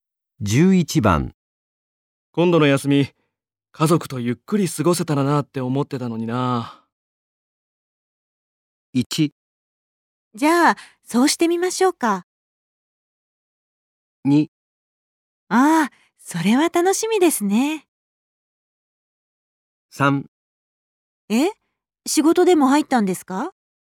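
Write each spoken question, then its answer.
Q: 今度の休み、家族とゆっくり過ごせたらなって思ってたのにな。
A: 3: え、仕事でも入ったんですか?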